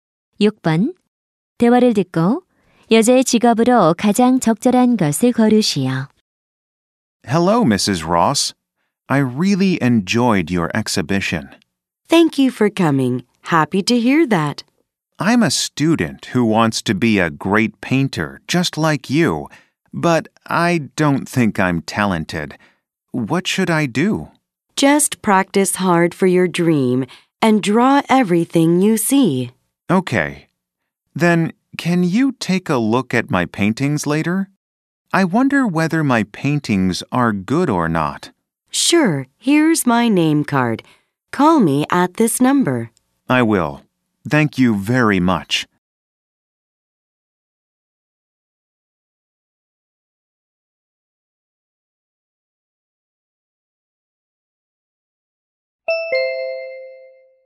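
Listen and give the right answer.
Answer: 화가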